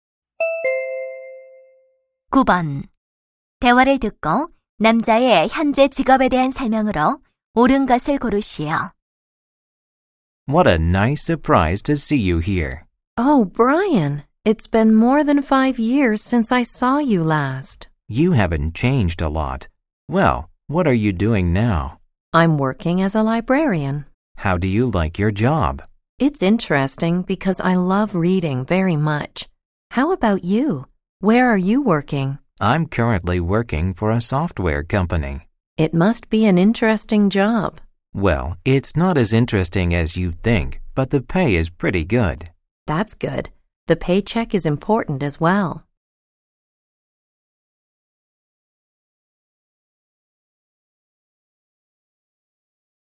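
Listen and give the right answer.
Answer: 소프트웨어 회사에서 일하며 보수가 좋다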